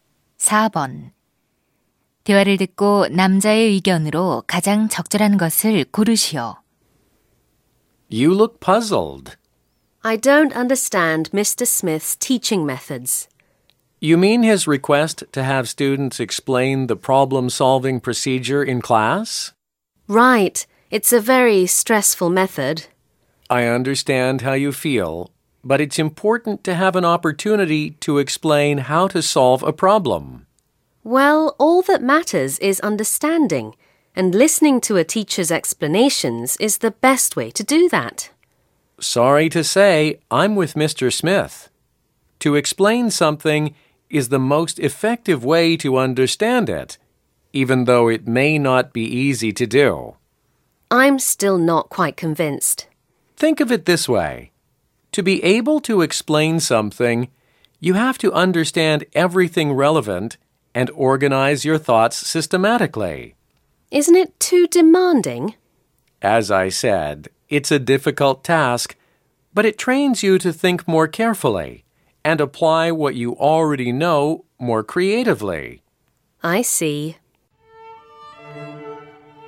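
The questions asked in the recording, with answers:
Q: 대화를 듣고 남자의 의견으로 가장 적절한 것을 고르시오.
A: 무언가를 설명하는 것이 그것을 이해하는 가장 효과적인 방법이다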